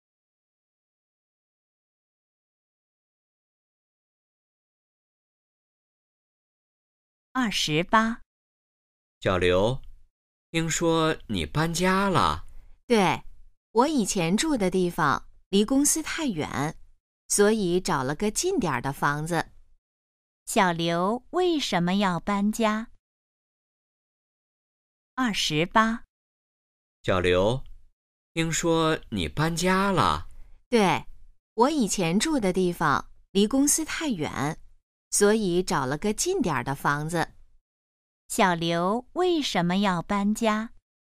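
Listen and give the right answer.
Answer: 以前住的地方离公司太远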